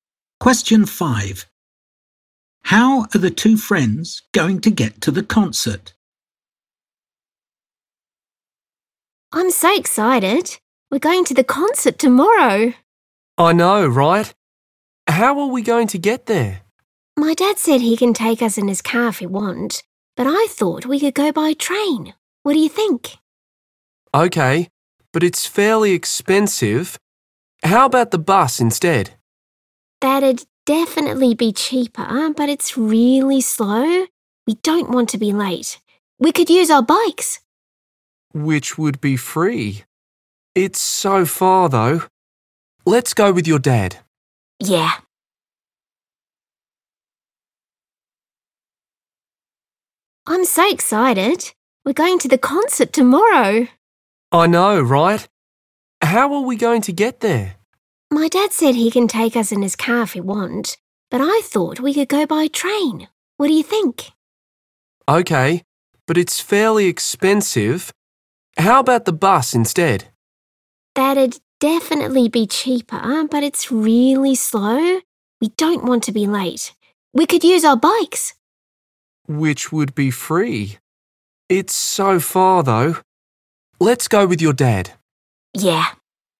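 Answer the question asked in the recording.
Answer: by car (with dad)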